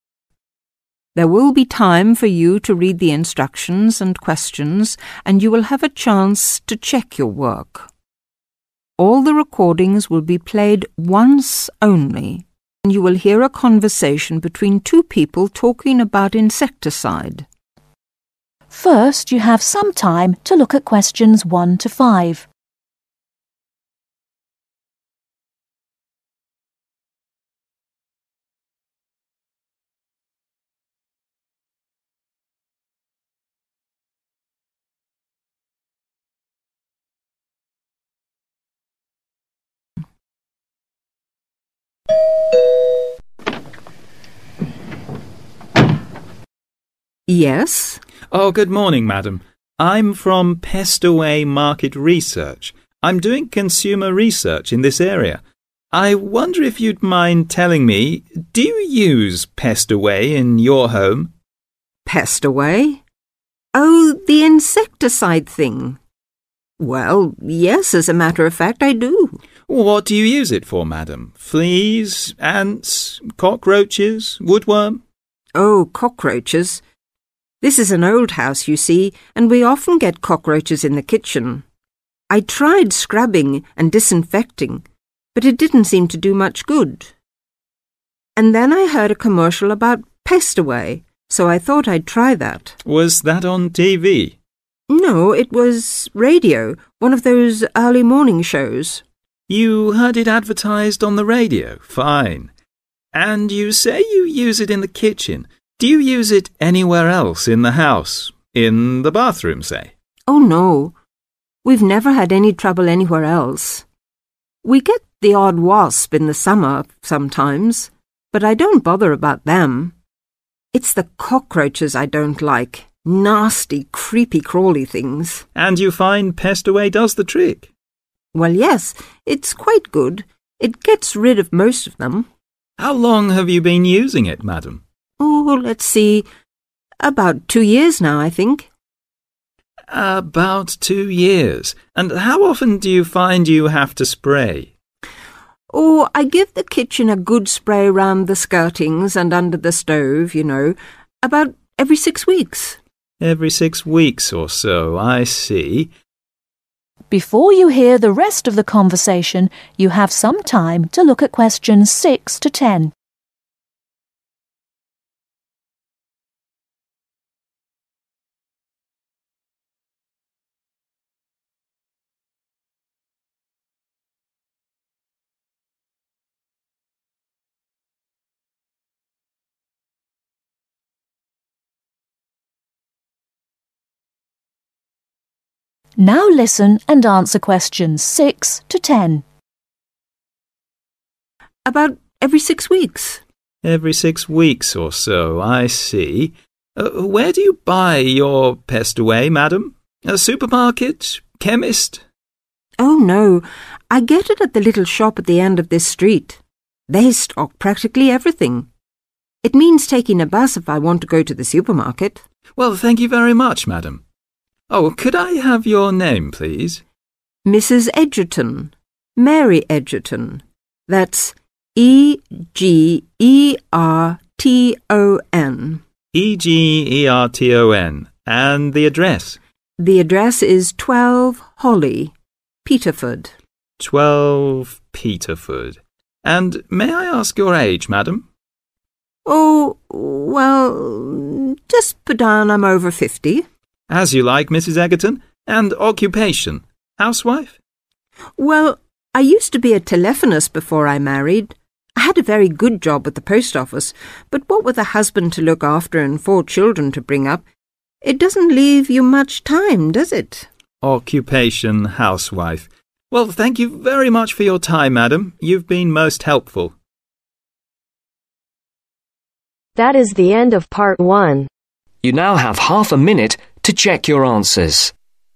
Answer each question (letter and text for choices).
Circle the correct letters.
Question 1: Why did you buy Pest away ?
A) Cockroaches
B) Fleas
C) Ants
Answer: A) Cockroaches

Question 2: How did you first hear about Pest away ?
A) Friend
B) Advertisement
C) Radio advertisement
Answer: C) Radio advertisement

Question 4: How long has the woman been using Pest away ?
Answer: 2 years

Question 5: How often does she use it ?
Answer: 6 Weeks

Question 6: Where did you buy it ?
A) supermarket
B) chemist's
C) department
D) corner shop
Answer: D) corner shop

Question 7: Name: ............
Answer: MARY EGERTON

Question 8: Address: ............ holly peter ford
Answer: 12

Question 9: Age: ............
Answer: (OVER) 50

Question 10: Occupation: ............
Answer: HOUSE WIFE